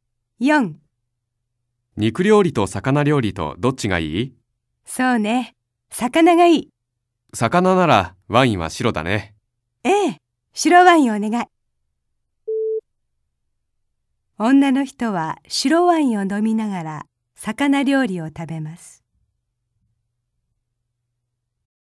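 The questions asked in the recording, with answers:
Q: 女の人は白ワインを飲みながら魚料理を食べます。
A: ○(正しい)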